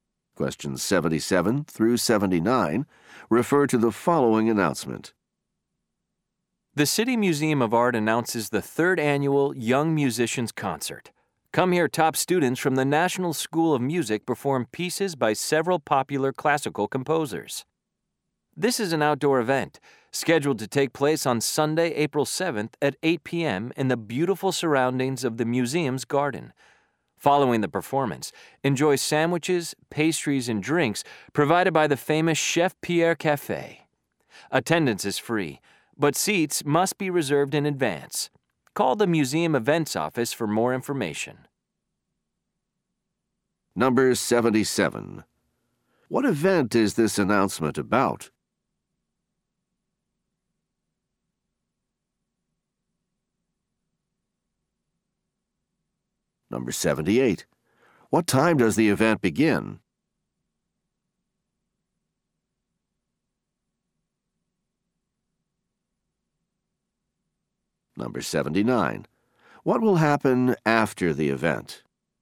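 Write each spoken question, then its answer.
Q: What event is this announcement about?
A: A concert by young musicians

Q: What time does the event begin?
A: 8 p.m.

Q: What will happen after the event?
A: Food and drinks will be served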